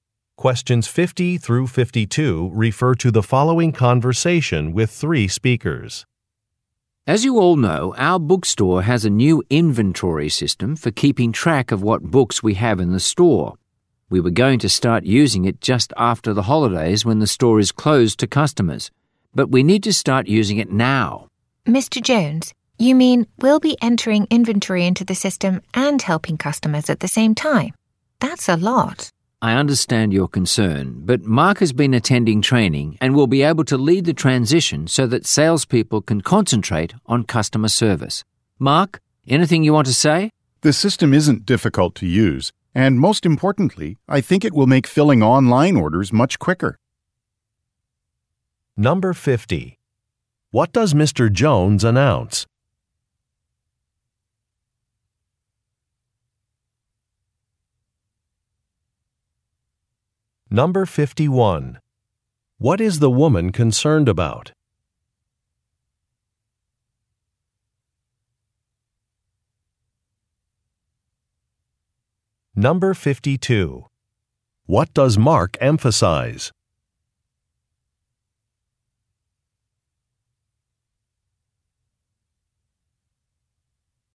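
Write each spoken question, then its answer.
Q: What does Mr. Jones announce?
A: The store will start using the new inventory system now, earlier than planned

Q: What is the woman concerned about?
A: Having to enter inventory and help customers at the same time

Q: What does Mark emphasize?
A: The system will make filling online orders much quicker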